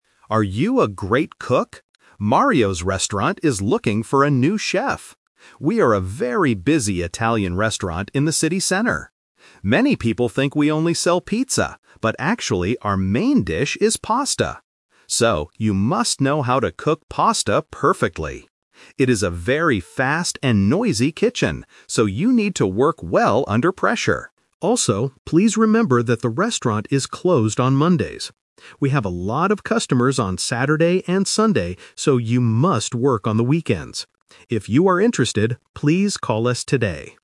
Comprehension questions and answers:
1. What kind of food must the new chef know how to cook?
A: Pasta

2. What is the kitchen at Mario's Restaurant like?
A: It is fast and noisy.

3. When does the new chef have to work?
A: On the weekends

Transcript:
Announcer: Are you a great cook? Mario's Restaurant is looking for a new chef! We are a very busy Italian restaurant in the city center. Many people think we only sell pizza, but actually, our main dish is pasta. So, you must know how to cook pasta perfectly. It is a very fast and noisy kitchen, so you need to work well under pressure. Also, please remember that the restaurant is closed on Mondays. We have a lot of customers on Saturday and Sunday, so you must work on the weekends. If you are interested, please call us today!

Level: A2